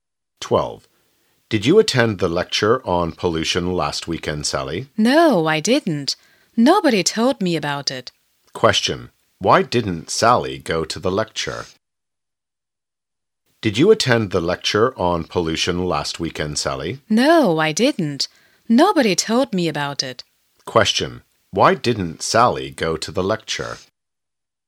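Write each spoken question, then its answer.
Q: why didn't Sally go to the lecture?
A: Nobody told her about it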